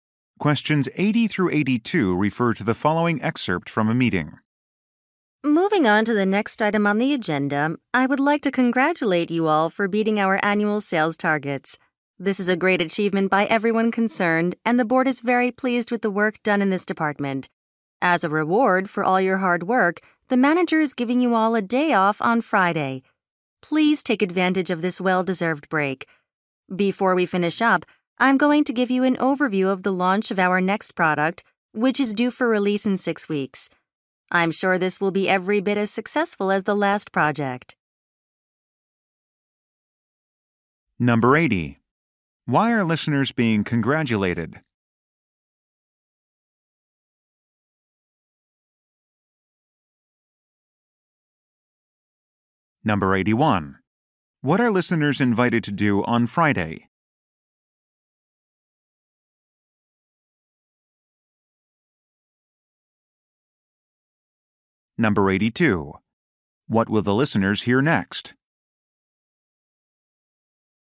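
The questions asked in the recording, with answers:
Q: Why are listeners being congratulated?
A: They beat the annual sales targets

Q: What are listeners invited to do on Friday?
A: Take a day off

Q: What will the listeners hear next?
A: An overview of the next product launch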